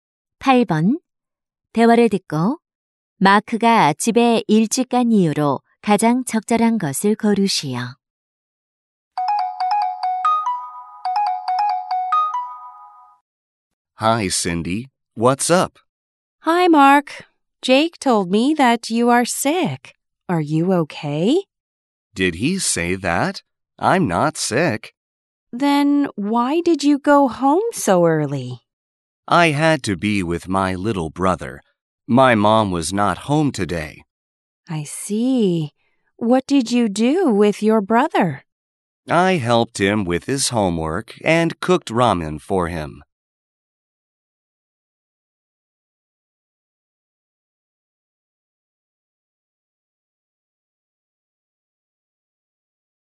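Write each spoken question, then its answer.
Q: 대화를 듣고 마크가 집에 일찍 간 이유로 가장 적절한 것을 고르시오.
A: 엄마가 안 계셔서 남동생과 함께 있어야 해서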